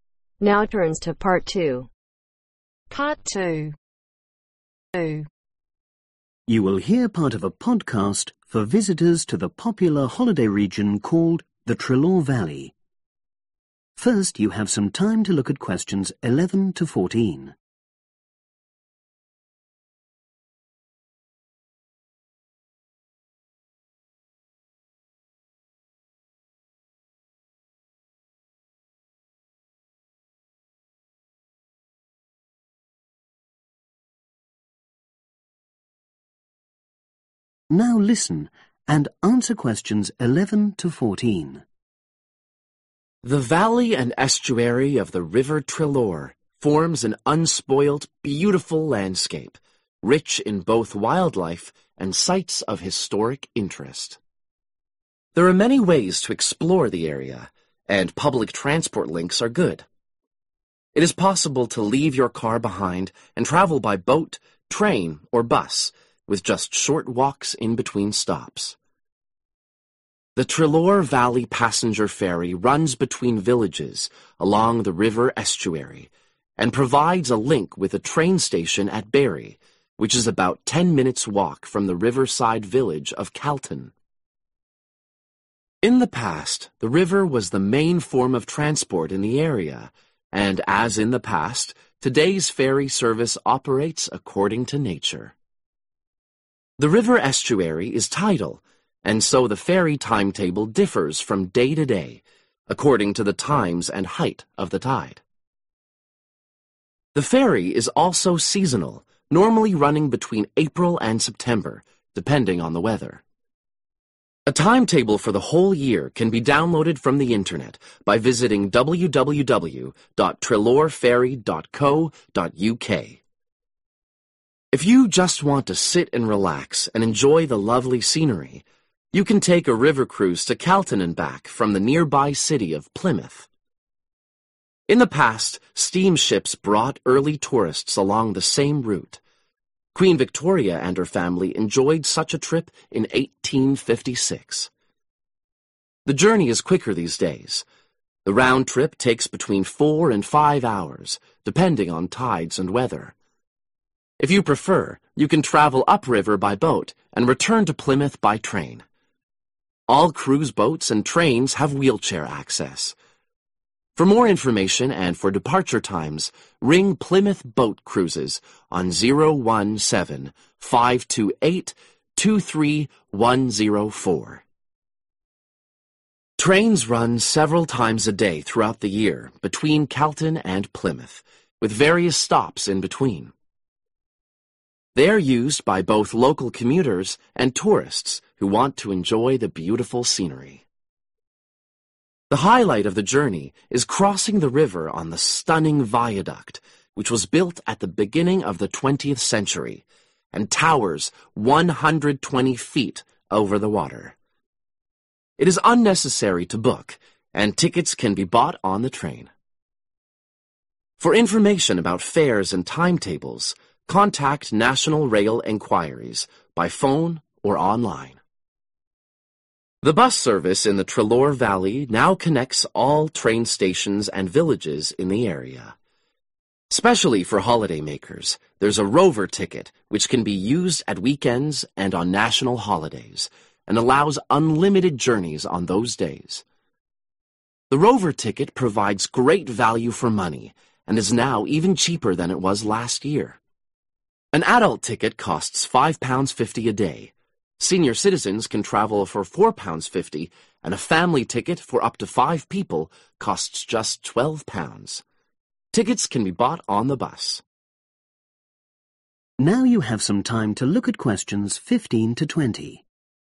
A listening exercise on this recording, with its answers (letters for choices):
Choose the correct letter A , B or C.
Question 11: The Treloar Valley passenger ferry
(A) usually starts services in April.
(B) departs at the same time each day.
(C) is the main means of transport for local villagers.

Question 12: What does the speaker say about the river cruise ?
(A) It can be combined with a train journey.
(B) It's unsuitable for people who have walking difficulties.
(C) The return journey takes up to four hours.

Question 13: What information is given about train services in the area ?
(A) Trains run non-stop between Carlton and Plymouth.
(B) One section of the rail track is raised.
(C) Bookings can be made by telephone or the Internet.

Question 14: The 'Rover' bus ticket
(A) can be used for up to five journeys a day.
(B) is valid for weekend travel only.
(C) has recently gone down in price.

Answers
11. A
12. A
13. B
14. C